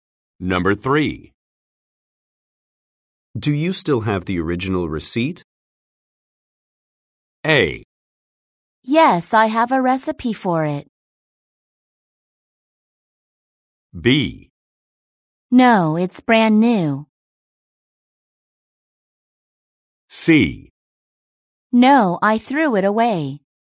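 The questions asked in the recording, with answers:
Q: Do you still have the original receipt?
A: C: No, I threw it away.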